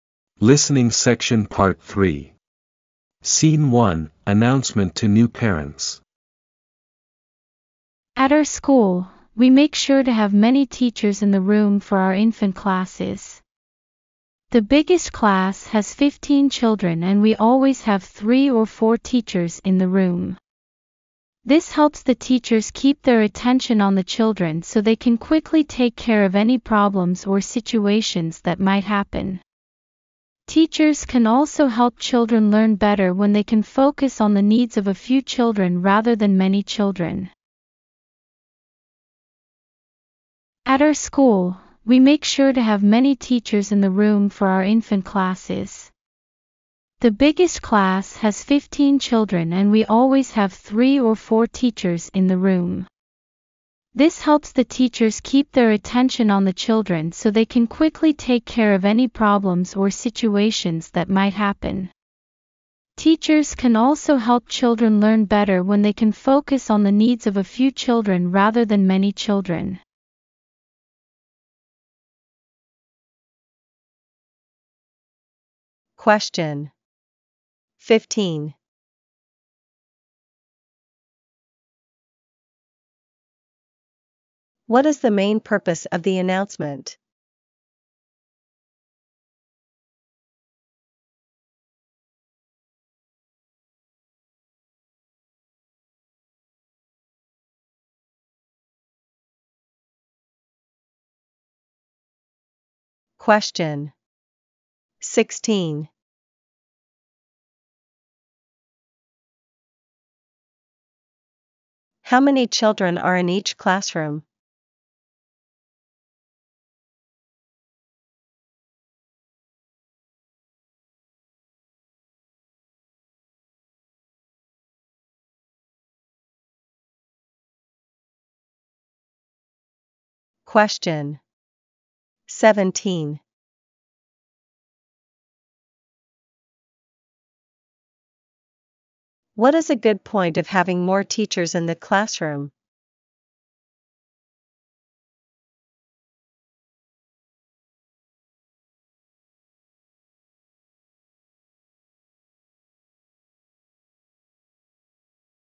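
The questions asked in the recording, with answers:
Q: What is a good point of having more teachers in the classroom?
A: Teachers can quickly handle problems and help children learn better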